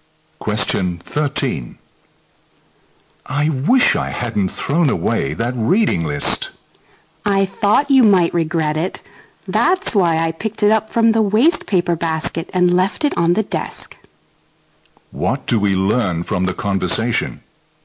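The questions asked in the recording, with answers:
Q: What do we learn from the conversation?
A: The man picked the reading list out of the wastebasket and left it on the desk.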